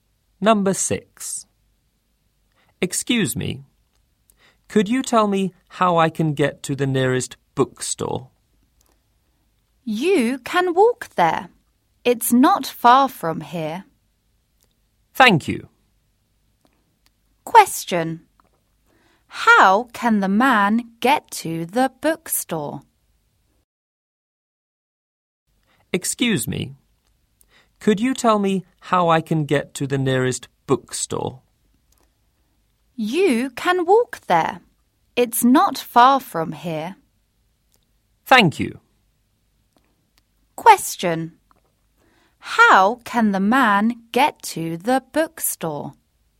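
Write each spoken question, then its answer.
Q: How can the man get to the bookstore?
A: On foot (walk there)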